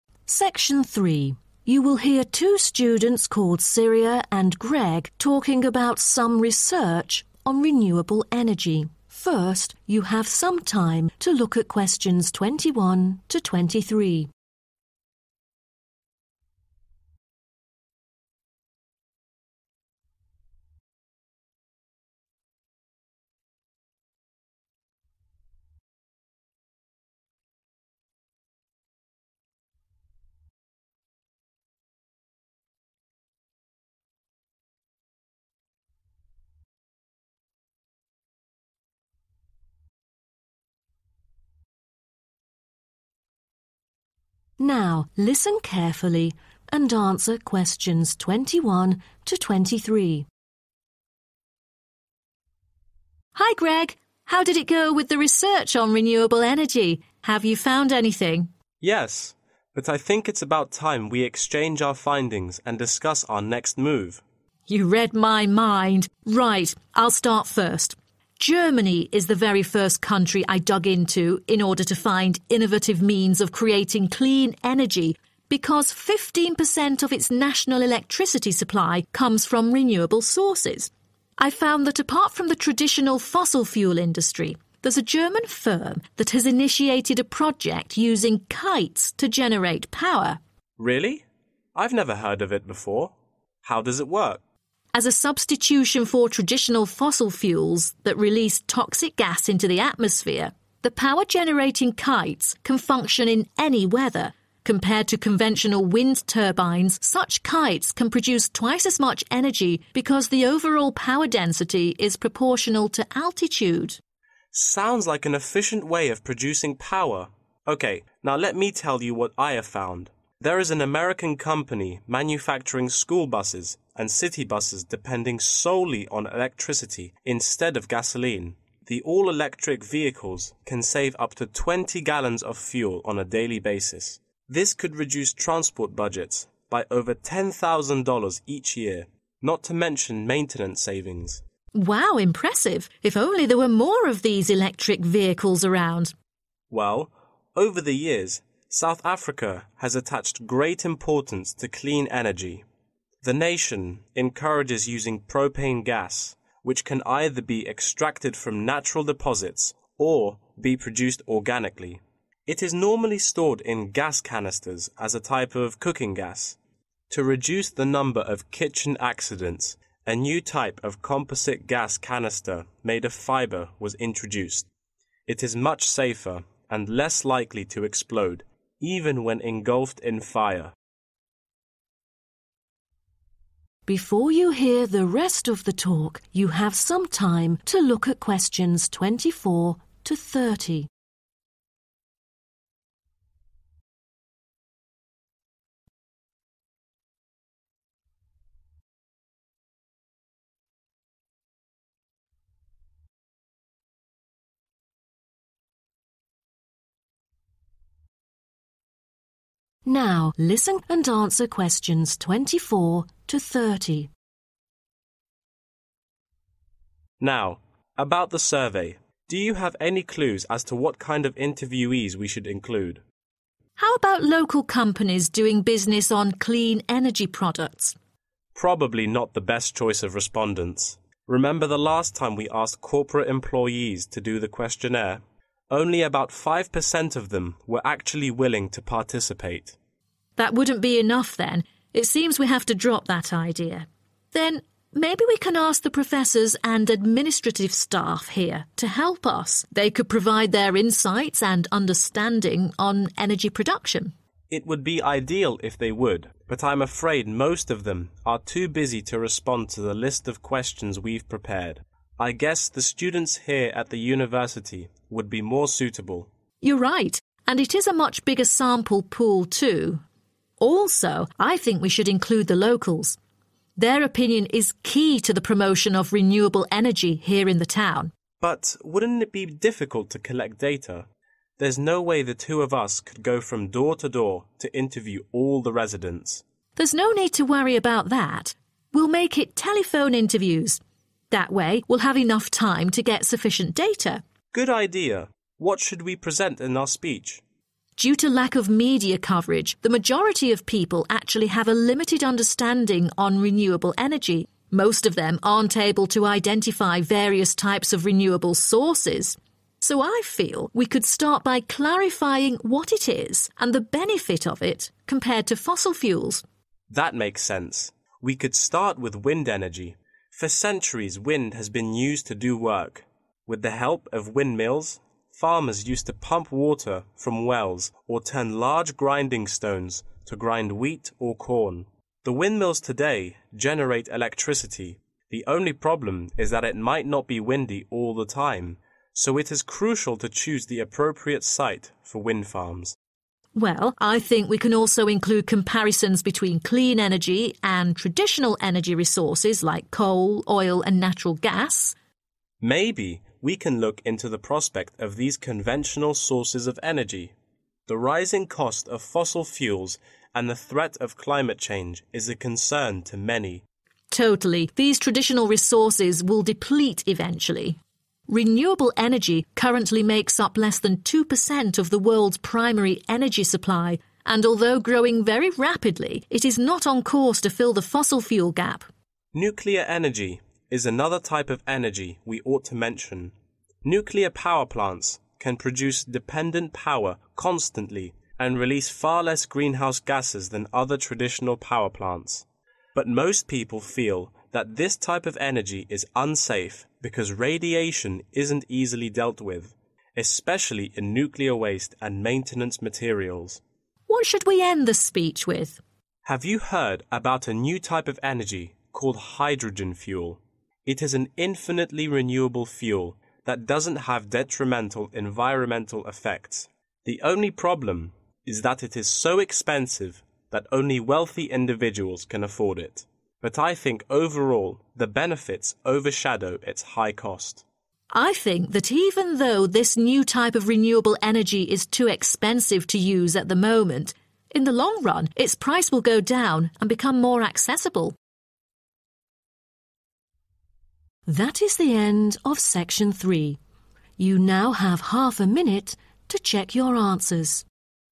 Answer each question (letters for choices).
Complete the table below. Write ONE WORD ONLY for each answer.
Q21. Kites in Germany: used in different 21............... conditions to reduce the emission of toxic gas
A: weather

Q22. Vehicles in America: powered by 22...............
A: electricity

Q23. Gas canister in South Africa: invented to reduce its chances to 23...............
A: explode

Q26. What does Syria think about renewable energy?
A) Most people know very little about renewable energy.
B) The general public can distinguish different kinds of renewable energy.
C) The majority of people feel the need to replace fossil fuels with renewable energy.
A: A

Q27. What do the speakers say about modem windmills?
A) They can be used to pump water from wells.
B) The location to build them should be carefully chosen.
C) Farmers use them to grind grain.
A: B

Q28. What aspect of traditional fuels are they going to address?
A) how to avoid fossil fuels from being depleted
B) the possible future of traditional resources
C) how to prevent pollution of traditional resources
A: B

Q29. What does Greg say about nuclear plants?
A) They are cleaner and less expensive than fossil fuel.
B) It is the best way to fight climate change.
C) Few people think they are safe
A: C

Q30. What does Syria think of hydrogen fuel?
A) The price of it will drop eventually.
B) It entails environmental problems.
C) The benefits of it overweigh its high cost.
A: A